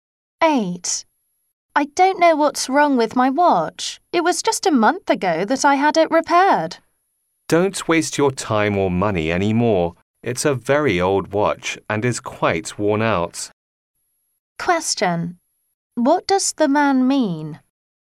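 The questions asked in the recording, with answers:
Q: What does the man mean?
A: The watch isn't worth repairing; she should get a new one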